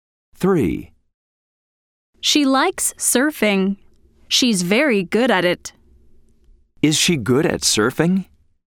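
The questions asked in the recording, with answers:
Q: Is she good at surfing?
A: Yes, she is.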